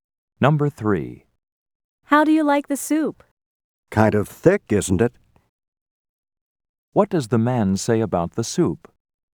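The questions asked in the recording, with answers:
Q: What does the man say about the soup?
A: It's too thick.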